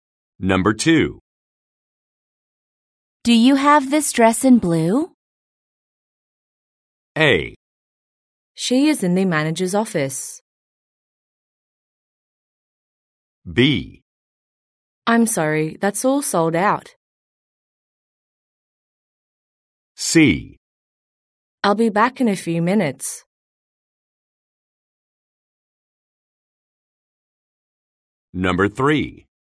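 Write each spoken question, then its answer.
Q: Do you have this dress in blue?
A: B: I'm sorry, that's all sold out.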